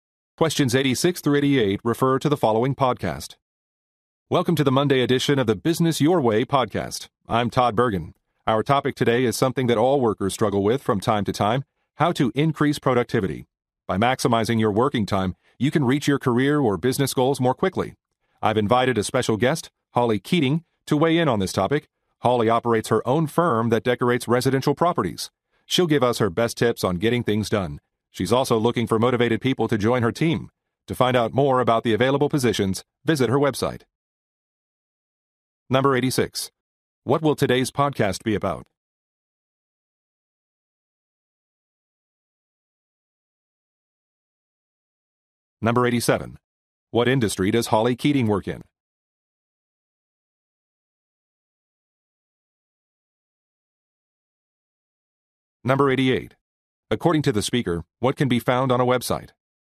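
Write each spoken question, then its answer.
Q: What will today's podcast be about?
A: How to increase productivity

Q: What industry does Holly Keating work in?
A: Interior decorating of residential properties

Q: According to the speaker, what can be found on a website?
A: Information about job openings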